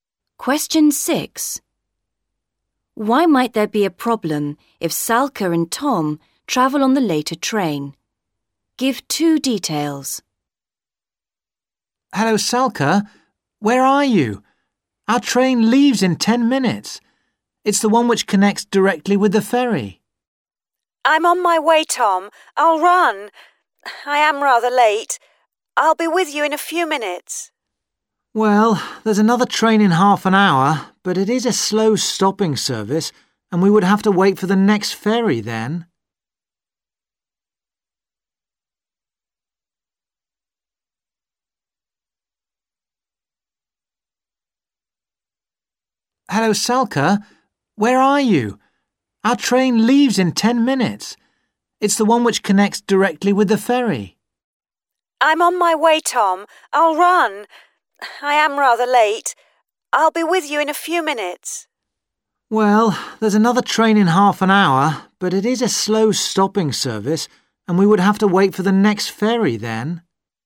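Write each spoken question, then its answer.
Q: Why might there be a problem if Salka and Tom travel on the later train?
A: It is a slow stopping train, and they would have to wait for the next ferry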